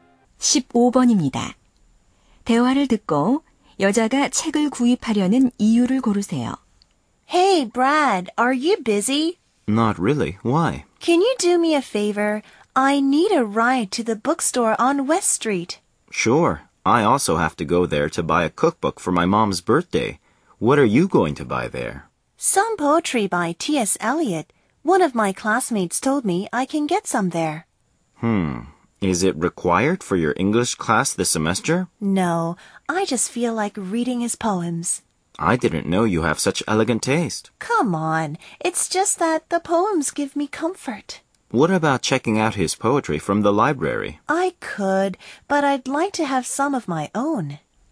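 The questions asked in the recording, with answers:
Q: 대화를 듣고 여자가 책을 구입하려는 이유를 고르세요.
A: 시가 위안을 주어서 직접 소장하고 싶어서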